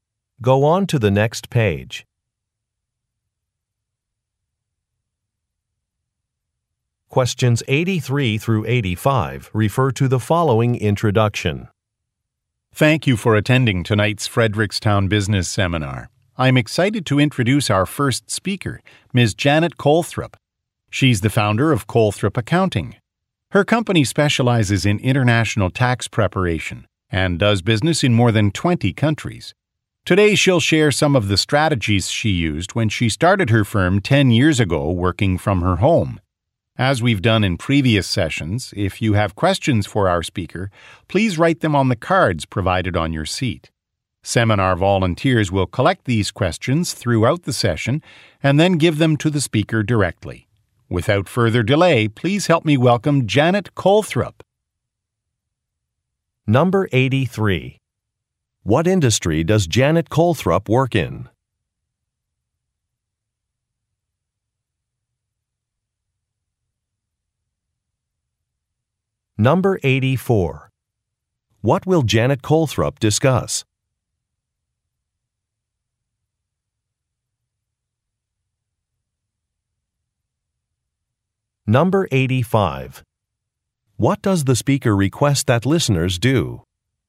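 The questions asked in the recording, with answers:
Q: What industry does Janet Colthrop work in?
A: Accounting

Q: What will Janet Colthrop discuss?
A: Strategies she used when starting her business

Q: What does the speaker request that listeners do?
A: Write questions on the cards provided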